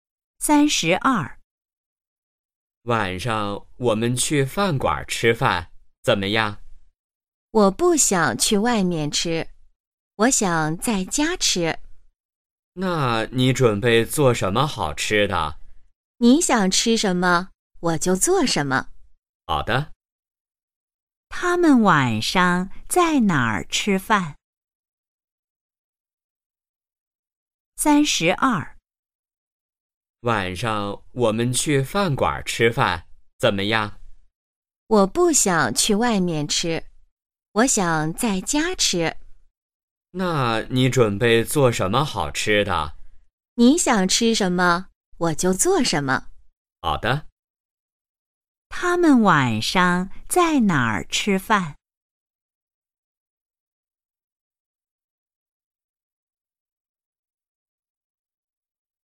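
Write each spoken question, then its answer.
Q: 他们晚上在哪儿吃饭?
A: 在家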